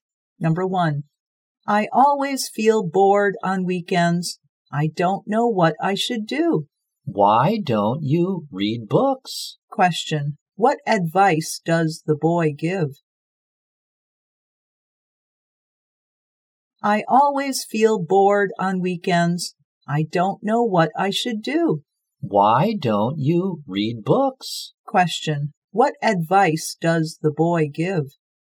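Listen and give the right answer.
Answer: Read books.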